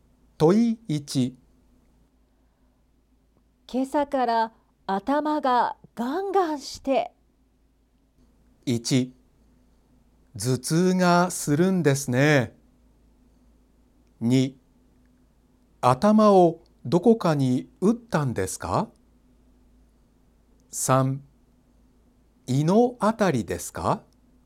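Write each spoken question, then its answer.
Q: 今朝から頭がガンガンして。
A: 1: 頭痛がするんですね。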